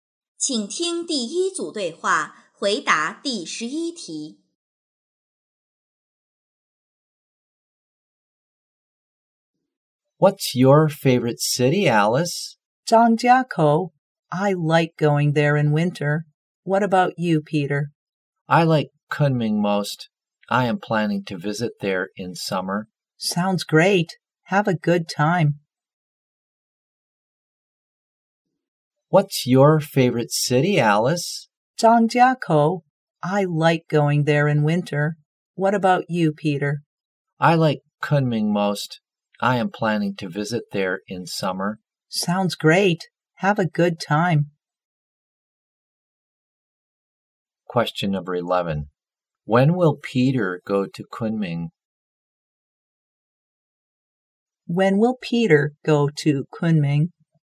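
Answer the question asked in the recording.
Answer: In summer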